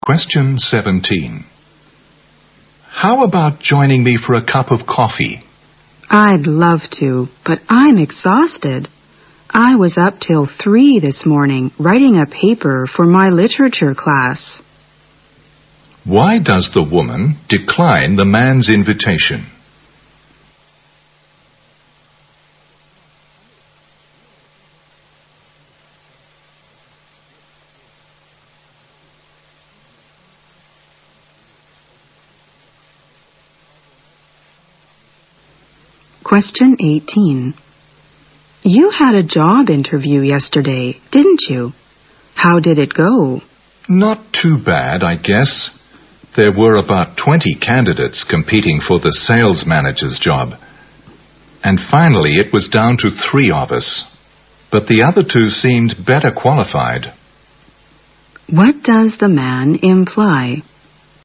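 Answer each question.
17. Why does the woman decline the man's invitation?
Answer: She wants to get some sleep.

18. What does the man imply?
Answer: His chance of getting the job is slim.

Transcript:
M: How about joining me for a cup of coffee?
W: I'd love to, but I'm exhausted. I was up till 3 this morning, writing a paper for my literature class.
Q: Why does the woman decline the man's invitation?
W: You had a job interview yesterday, didn't you? How did it go?
M: Not too bad, I guess. There were about 20 candidates competing for the sales manager's job. And finally it was down to three of us, but the other two seemed better qualified.
Q: What does the man imply?

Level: 大学英语四级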